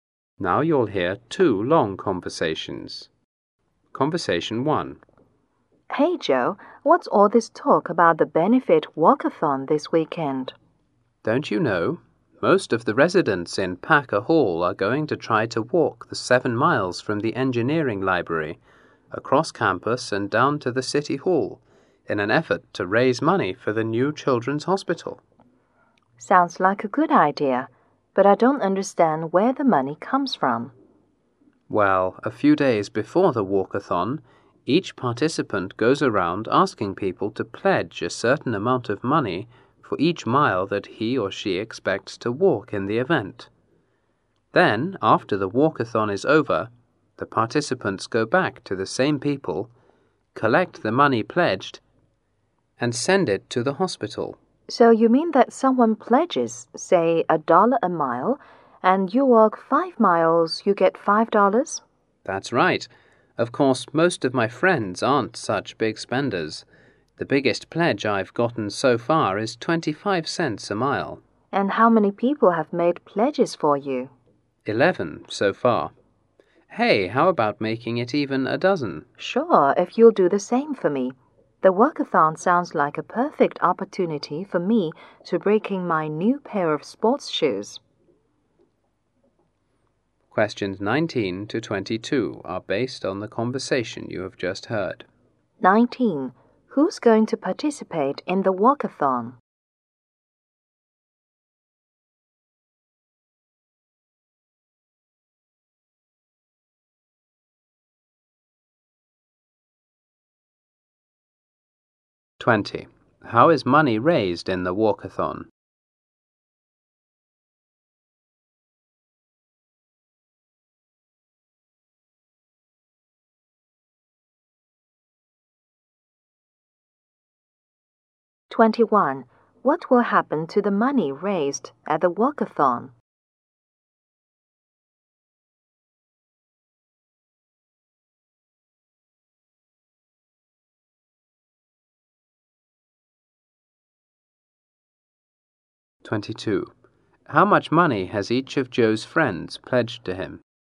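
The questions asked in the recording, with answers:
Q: Who's going to participate in the walkathon?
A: Most residents of Packer Hall

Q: How is money raised in the walkathon?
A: People pledge money for each mile a participant walks

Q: What will happen to the money raised at the walkathon?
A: It will be sent to the new children's hospital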